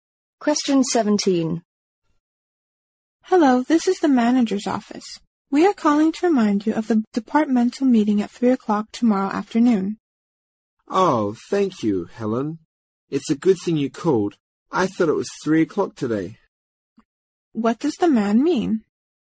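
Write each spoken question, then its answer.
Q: What does the man mean?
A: He had mistaken the meeting time as today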